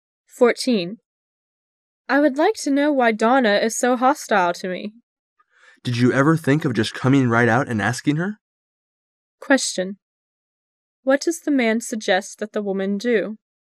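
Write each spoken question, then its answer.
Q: What does the man suggest that the woman do?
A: Ask Donna directly why she is hostile

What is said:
[解析] W: I would like to know why Donna is so hostile to me. M: Did you ever think of just coming right out and asking her? Q: What does the man suggest that the woman do?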